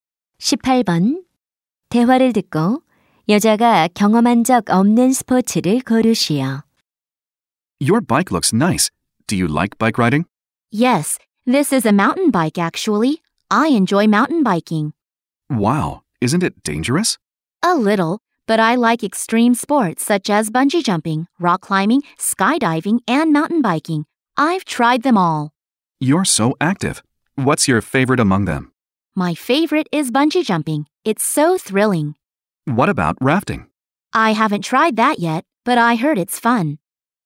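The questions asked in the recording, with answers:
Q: 대화를 듣고 여자가 경험한 적 없는 스포츠를 고르시오.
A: 래프팅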